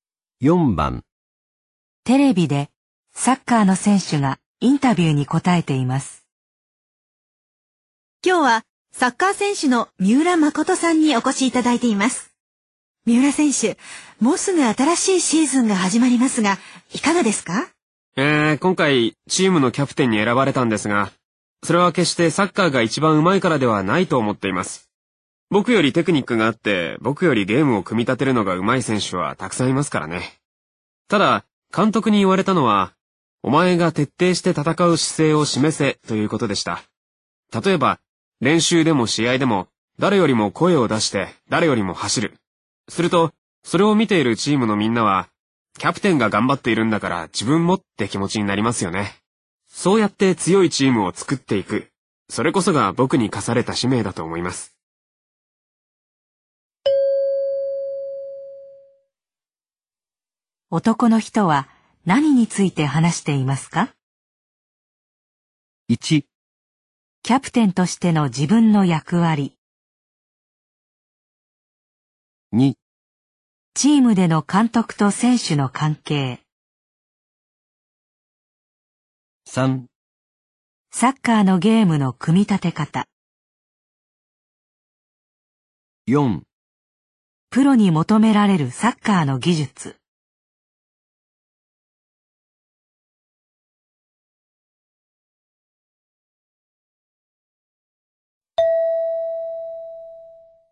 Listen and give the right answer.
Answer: 1

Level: N2 Listening · Test 12